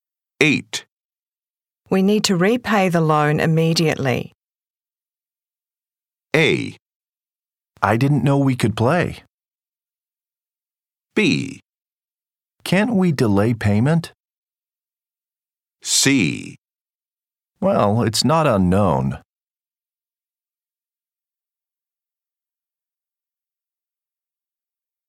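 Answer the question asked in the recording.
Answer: B: Can't we delay payment?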